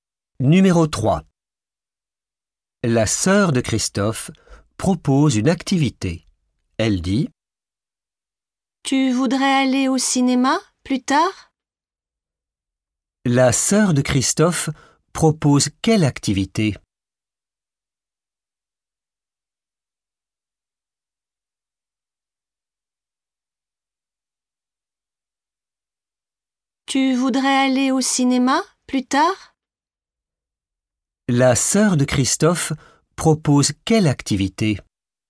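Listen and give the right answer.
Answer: aller au cinéma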